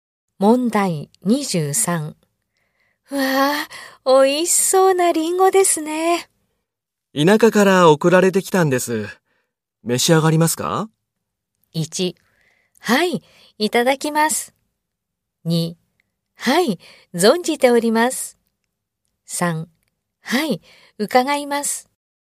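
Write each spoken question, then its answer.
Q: うわあ、美味しそうなリンゴですね。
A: 1: はい、いただきます。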